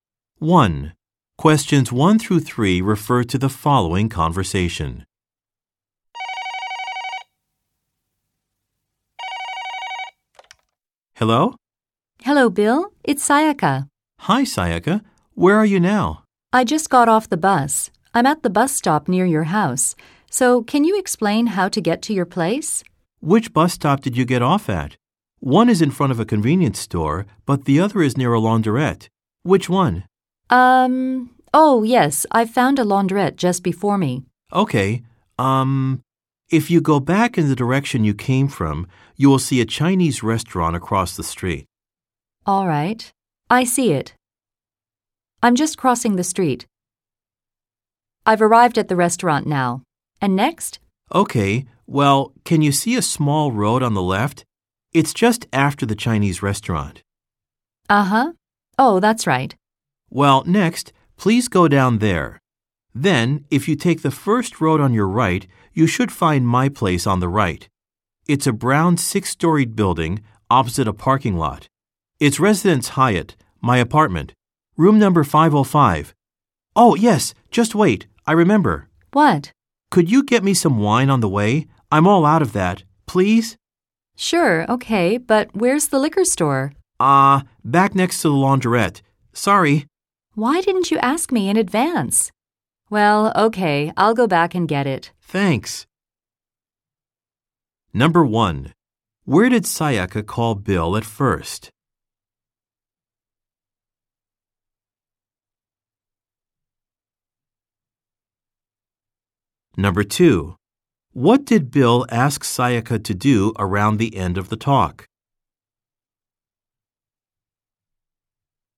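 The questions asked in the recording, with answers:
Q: Where did Sayaka call Bill at first?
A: At the bus stop near Bill's house

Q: What did Bill ask Sayaka to do around the end of the talk?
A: Get him some wine on the way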